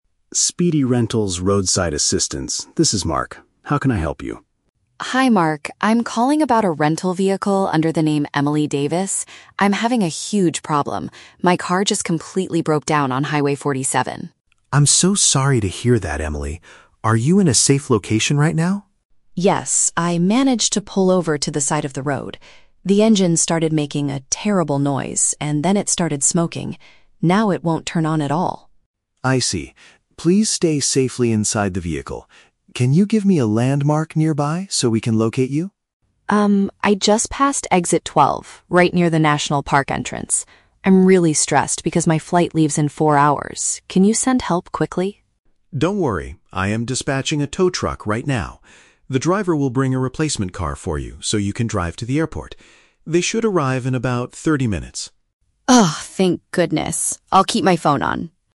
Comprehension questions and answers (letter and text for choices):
Listen to the telephone conversation between a tourist and a rental company representative. Choose the correct answer (A, B, or C) for each question.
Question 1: What is the main reason Emily is calling?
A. She had a flat tire on the highway.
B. The vehicle she rented stopped working.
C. She is lost and cannot find the national park.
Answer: B. The vehicle she rented stopped working.

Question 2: Why is the woman feeling so stressed?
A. She might miss her upcoming flight.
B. She is worried about paying for the tow truck.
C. She missed the exit to the national park.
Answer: A. She might miss her upcoming flight.

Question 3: How will the company resolve the issue?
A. By fixing the engine on the side of the road.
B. By driving her directly to the airport.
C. By giving her another car to continue her trip.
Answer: C. By giving her another car to continue her trip.

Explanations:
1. The woman says her car "completely broke down" and "won't turn on at all." Option (B) uses synonyms to describe this situation.
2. She explicitly states, "I'm really stressed because my flight leaves in four hours." This matches option (A).
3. The representative says the tow truck driver will "bring a replacement car for you so you can drive to the airport." "Replacement car" means giving her another car.

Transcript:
Representative: Speedy Rentals roadside assistance, this is Mark. How can I help you?
Tourist: Hi Mark, I'm calling about a rental vehicle under the name Emily Davis. I'm having a huge problem. My car just completely broke down on Highway 47.
Representative: I'm so sorry to hear that, Emily. Are you in a safe location right now?
Tourist: Yes, I managed to pull over to the side of the road. The engine started making a terrible noise, and then it started smoking. Now it won't turn on at all.
Representative: I see. Please stay safely inside the vehicle. Can you give me a landmark nearby so we can locate you?
Tourist: Um, I just passed Exit 12, right near the national park entrance. I'm really stressed because my flight leaves in four hours. Can you send help quickly?
Representative: Don't worry. I am dispatching a tow truck right now. The driver will bring a replacement car for you so you can drive to the airport. They should arrive in about 30 minutes.